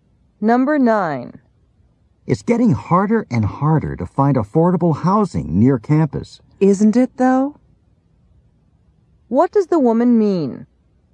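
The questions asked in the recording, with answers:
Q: What does the woman mean?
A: She agrees that affordable housing near campus is hard to find.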